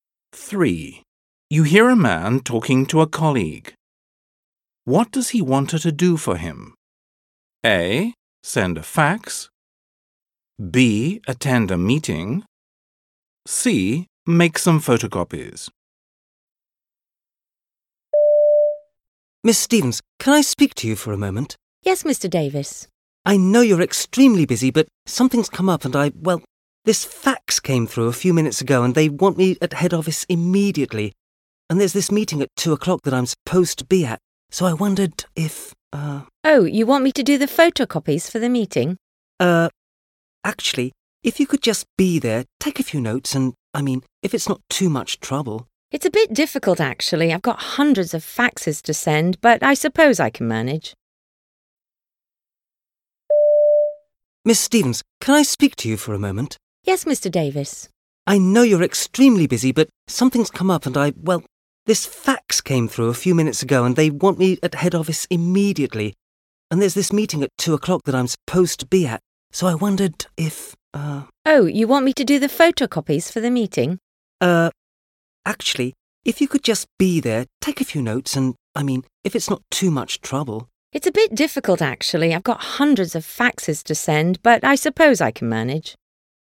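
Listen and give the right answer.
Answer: B: Attend a meeting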